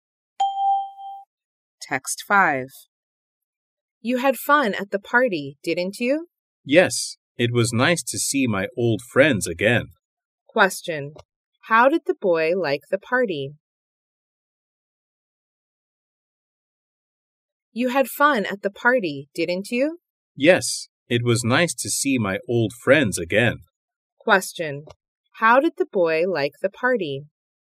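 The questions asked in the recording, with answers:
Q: How did the boy like the party?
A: He enjoyed it; it was nice to see his old friends.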